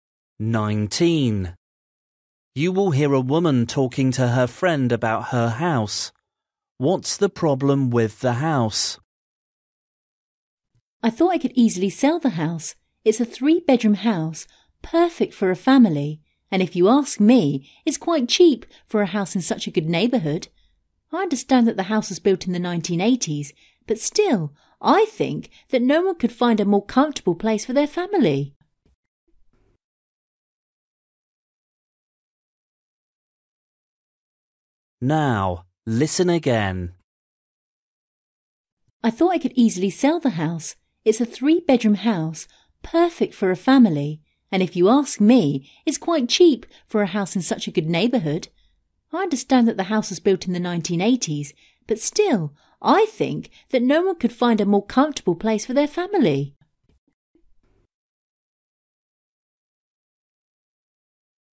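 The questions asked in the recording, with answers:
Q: What's the problem with the house?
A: It is old (built in the 1980s)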